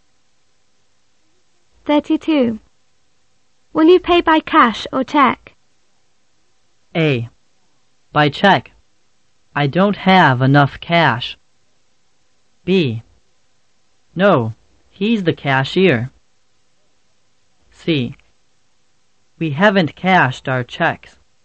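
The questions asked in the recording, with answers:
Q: Will you pay by cash or check?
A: A: By check. I don't have enough cash.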